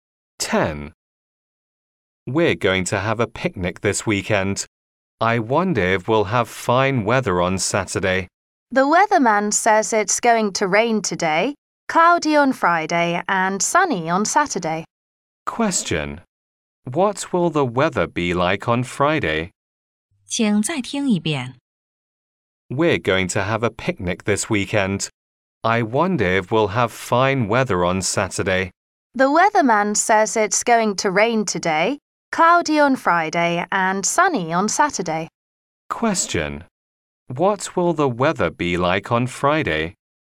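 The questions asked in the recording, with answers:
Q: What will the weather be like on Friday?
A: Cloudy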